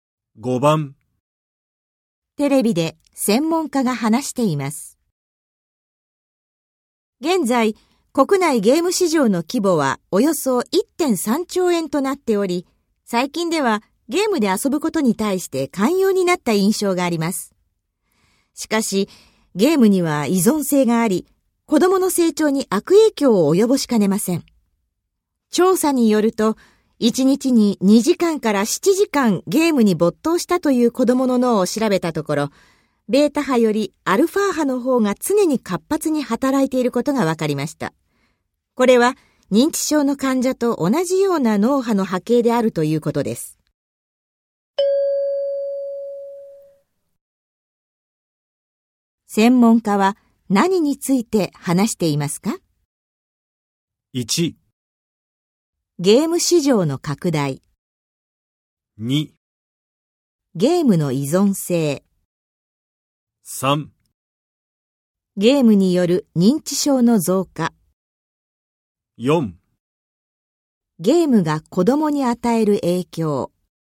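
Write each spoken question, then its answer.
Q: 専門家は何について話していますか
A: 4: ゲームが子供に与える影響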